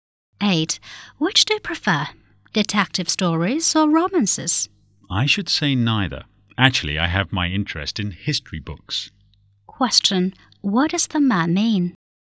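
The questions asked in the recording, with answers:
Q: What does the man mean?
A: He prefers history books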